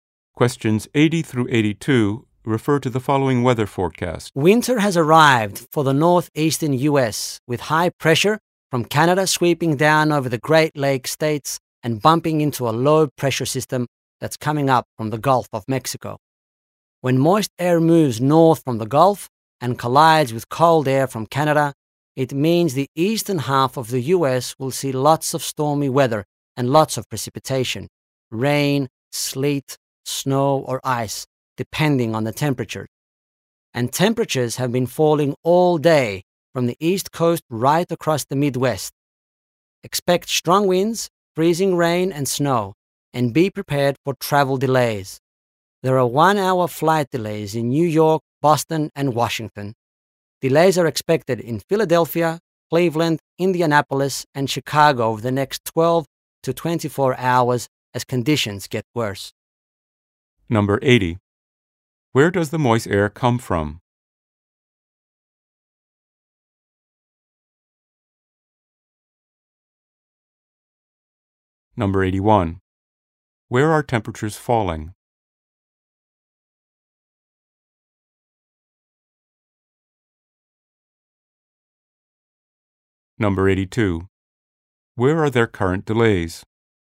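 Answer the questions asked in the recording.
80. The Gulf of Mexico
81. From the east coast across the Midwest
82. New York, Boston, and Washington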